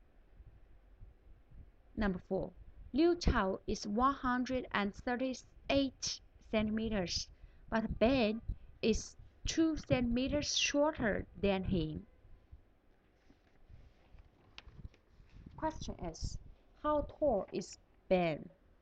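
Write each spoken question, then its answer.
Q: how tall is Ben?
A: 136 centimeters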